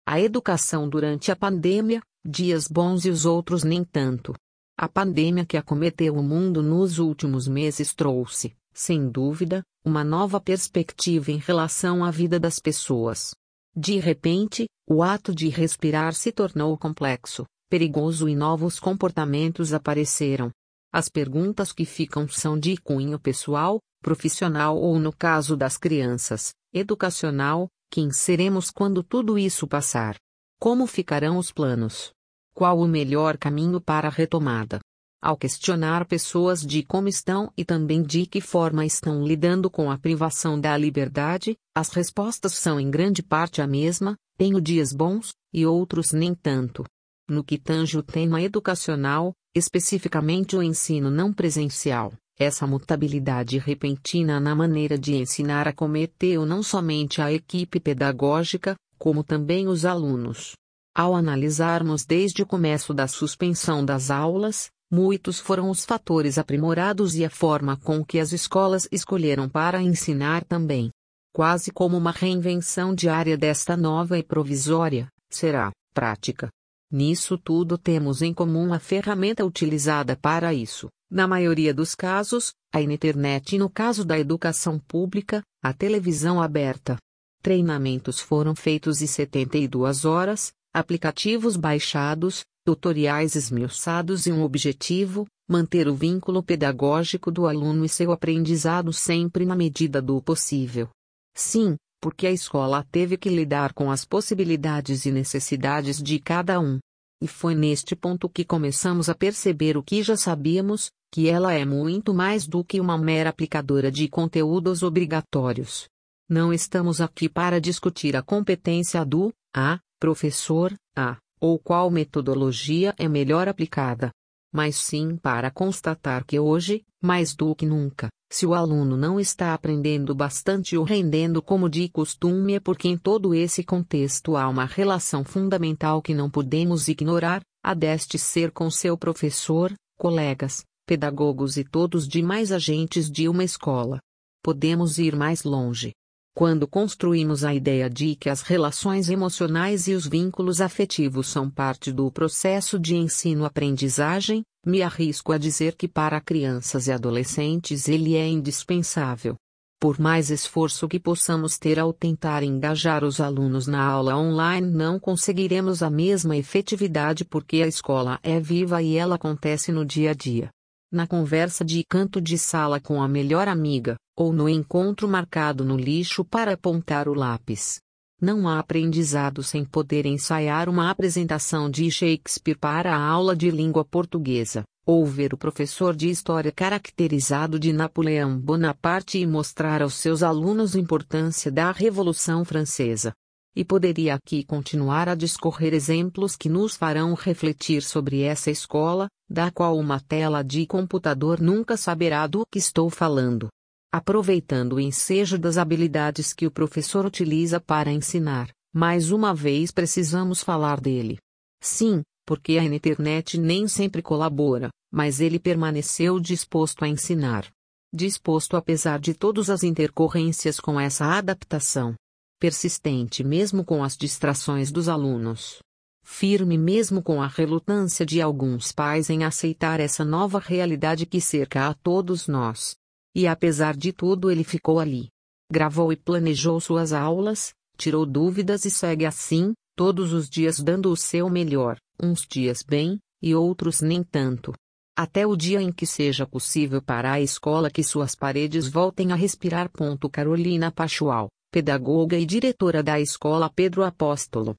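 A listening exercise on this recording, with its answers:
Copie as questões e responda no caderno:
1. Qual o título do texto?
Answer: A educação durante a pandemia: dias bons e os outros nem tanto

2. Quem é o autor?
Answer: Carolina Pachual

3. Quais outras informações sobre o autor aparecem no texto? Onde elas aparecem?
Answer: É pedagoga e diretora da escola Pedro Apóstolo; aparece no final do texto.

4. Qual o tema abordado neste texto?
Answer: A educação (ensino não presencial) durante a pandemia

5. Que ponto de vista o autor defende?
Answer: Que o ensino online não tem a mesma efetividade da escola presencial, pois os vínculos afetivos são indispensáveis ao aprendizado, e que o professor merece reconhecimento.

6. Que justificativas/argumentos ele usa para defender essa ideia?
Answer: A escola é viva e acontece no dia a dia, nas relações com professores e colegas; a tela do computador não substitui essas experiências; o professor persistiu apesar da internet, das distrações e da relutância de pais.

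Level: 2 oANO A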